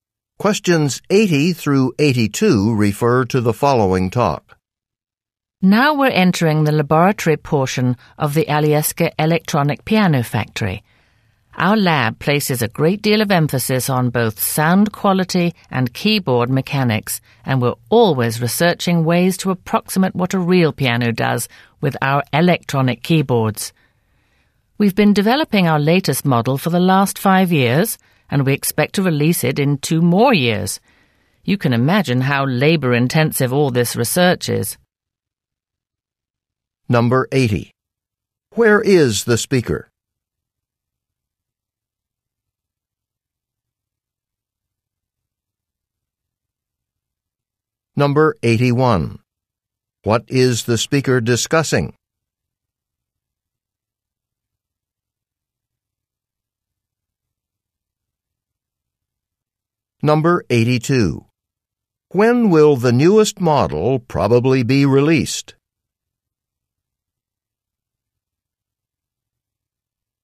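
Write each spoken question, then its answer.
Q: Where is the speaker?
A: In an electronic piano factory

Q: When will the newest model probably be released?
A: In 2 years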